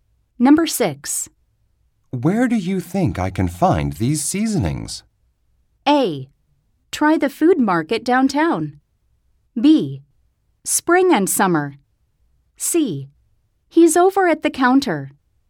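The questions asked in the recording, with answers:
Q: Where do you think I can find these seasonings?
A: A: Try the food market downtown.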